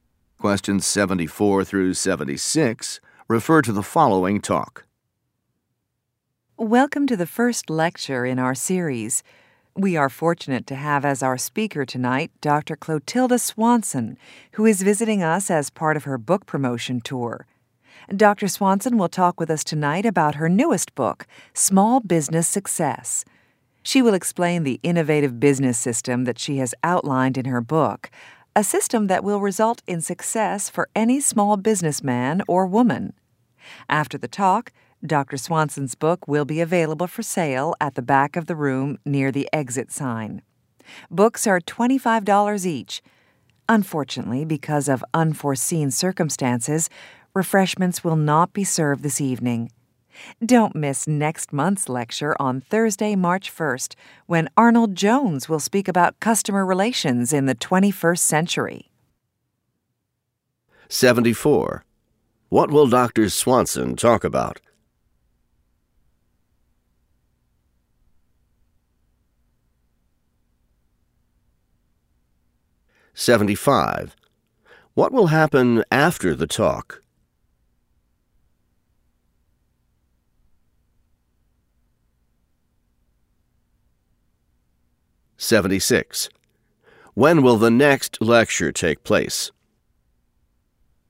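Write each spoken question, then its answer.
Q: What will Dr. Swanson talk about?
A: Her new book, Small Business Success

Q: What will happen after the talk?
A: Her book will be for sale

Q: When will the next lecture take place?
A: Thursday, March 1st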